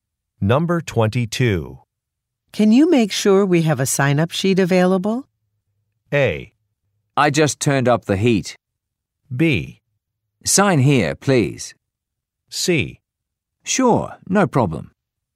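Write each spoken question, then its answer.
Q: Can you make sure we have a sign-up sheet available?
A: C: Sure, no problem.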